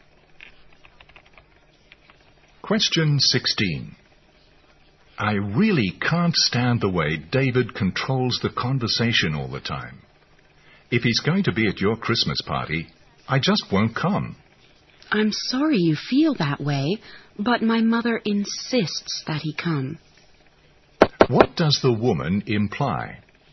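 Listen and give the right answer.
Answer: David will be at the party anyway, because her mother insists.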